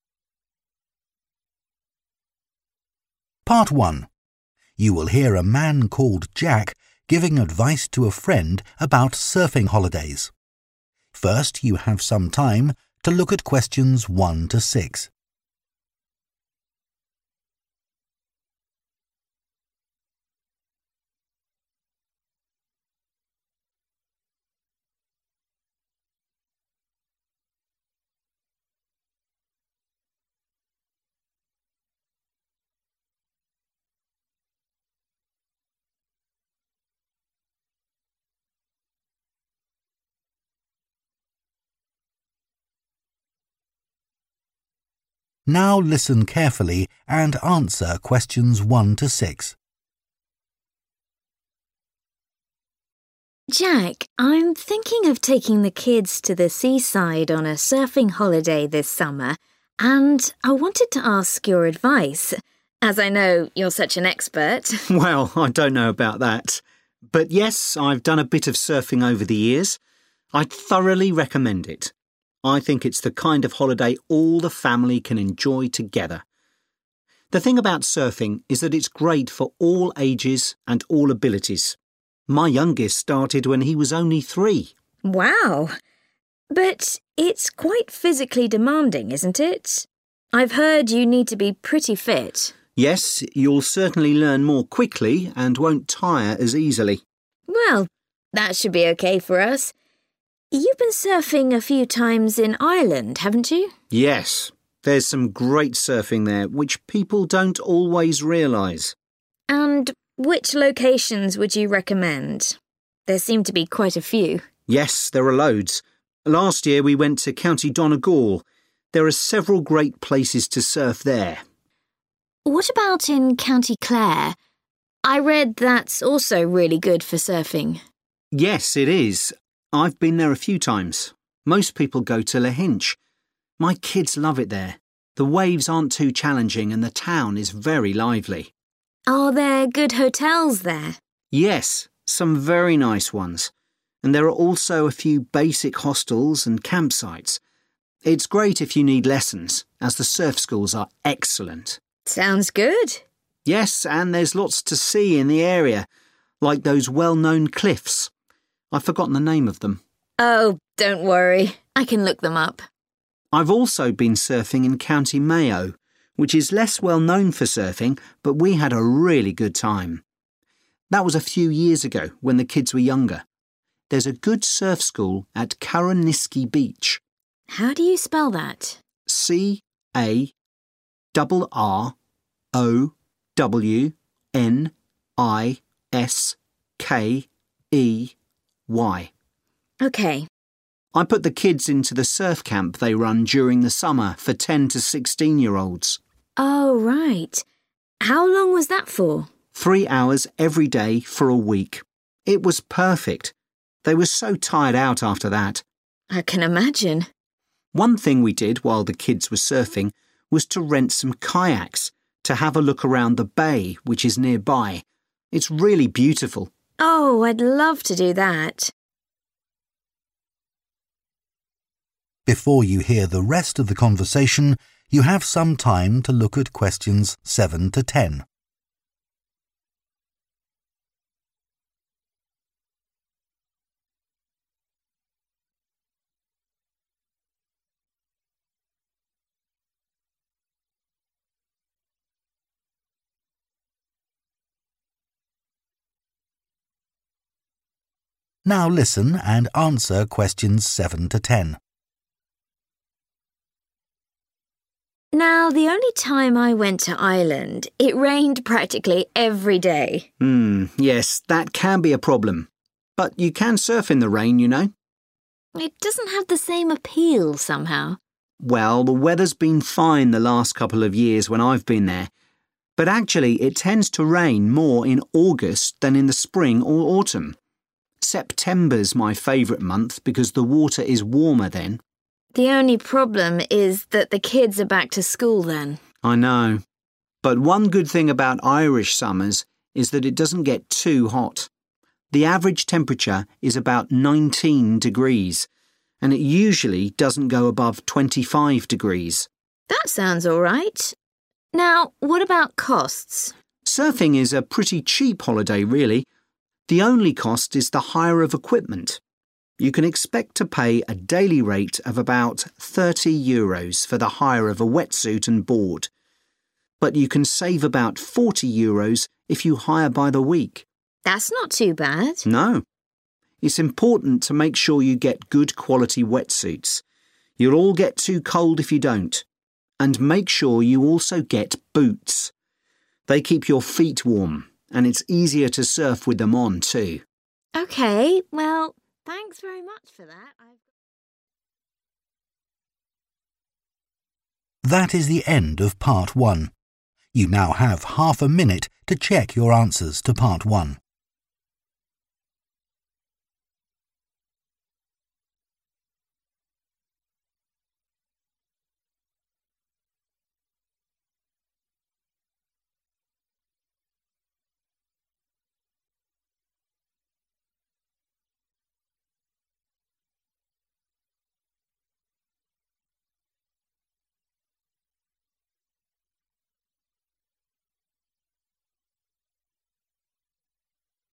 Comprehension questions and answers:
Complete the notes below. Write ONE WORD AND/OR A NUMBER for each answer.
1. Recommends surfing for 1 ................ holidays in the summer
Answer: Family

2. Need to be quite 2 ......................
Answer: Fits

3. Lahinch has some good quality 3 .................. and surf schools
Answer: Hotels

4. Good surf school at 4 .............. beach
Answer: Carrowniskey

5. Surf camp lasts for one 5 ...................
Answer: Week

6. Can also explore the local 6 ................... by kayak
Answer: Bay

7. Best month to go: 7 .......................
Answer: September

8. Average temperature in summer: approx. 8................... degrees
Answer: 19/ nineteen

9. Wetsuit and surfboard: 9 .................. euros per day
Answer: 30/ thirty

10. Also advisable to hire 10 .................. for warmth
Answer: Boots